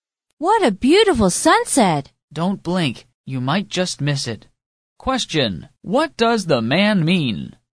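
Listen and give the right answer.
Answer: The sunset will be over very quickly.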